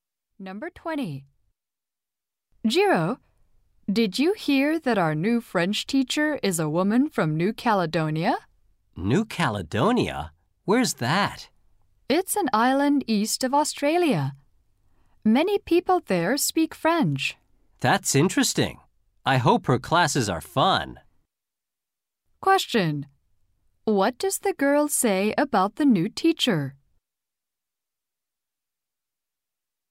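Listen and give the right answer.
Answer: She is from New Caledonia.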